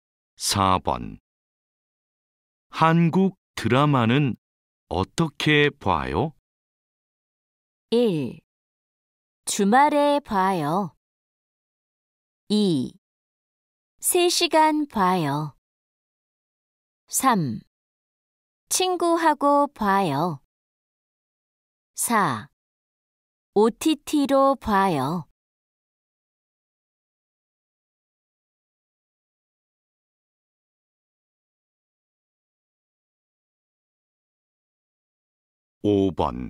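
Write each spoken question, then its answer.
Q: 한국 드라마는 어떻게 봐요?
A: 4: OTT로 봐요.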